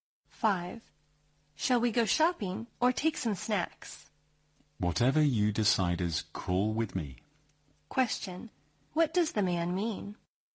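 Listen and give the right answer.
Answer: He doesn't mind either choice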